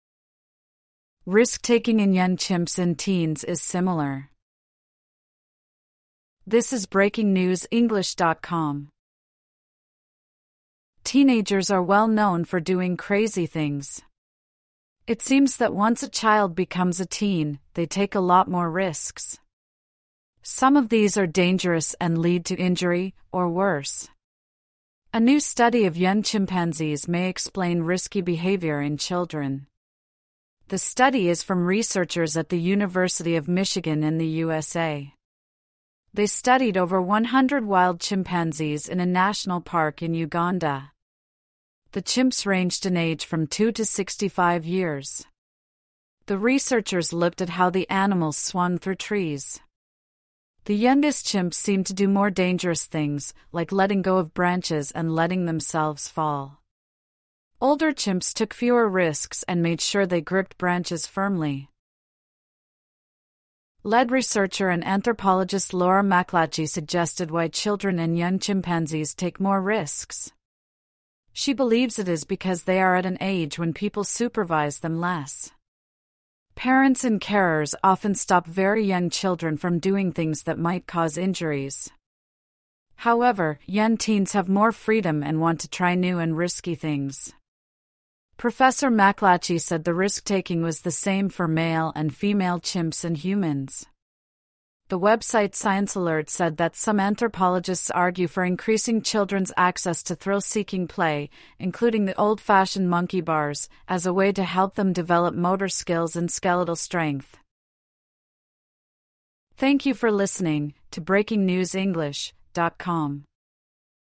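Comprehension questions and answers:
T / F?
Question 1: The article says all teenagers do very crazy things.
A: F

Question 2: Young children take more risks than teenagers.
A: F

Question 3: Researchers studied more than 100 chimps in Uganda.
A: T

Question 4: Researchers said older chimps were more likely to let go of branches.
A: F

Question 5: A researcher said chimpanzee behaviour helps explain teen behaviour.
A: T

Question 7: A researcher said male chimps took more risks than female chimps.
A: F

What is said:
Risk-taking in young chimps and teens is similar
Teenagers are well known for doing crazy things. It seems that once a child becomes a teen, they take a lot more risks. Some of these are dangerous and lead to injury, or worse. A new study of young chimpanzees may explain risky behaviour in children. The study is from researchers at the University of Michigan in the USA. They studied over 100 wild chimpanzees in a national park in Uganda. 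The chimps ranged in age from 2 to 65 years. The researchers looked at how the animals swung through trees. The youngest chimps seemed to do more dangerous things, like letting go of branches and letting themselves fall. Older chimps took fewer risks and made sure they gripped branches firmly.
Lead researcher and anthropologist Laura MacLatchy suggested why children and young chimpanzees take more risks. She believes it is because they are at an age when parents supervise them less. Parents and carers often stop very young children from doing things that might cause injuries. However, young teens have more freedom and want to try new and risky things. Professor MacLatchy said the risk-taking was the same for male and female chimps and humans. The website ScienceAlert said that "some anthropologists argue for increasing children's access to thrill-seeking play, including the old-fashioned monkey bars, as a way to help them develop motor skills and skeletal strength".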